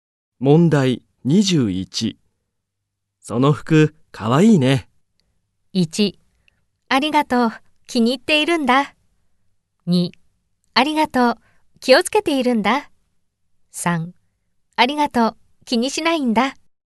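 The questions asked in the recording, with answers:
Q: その服かわいいね。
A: 1: ありがとう。気に入っているんだ。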